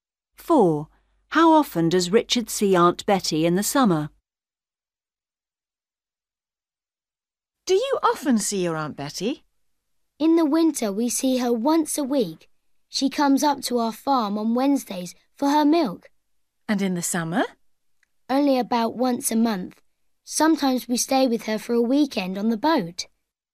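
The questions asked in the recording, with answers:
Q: How often does Richard see Aunt Betty in the summer?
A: About once a month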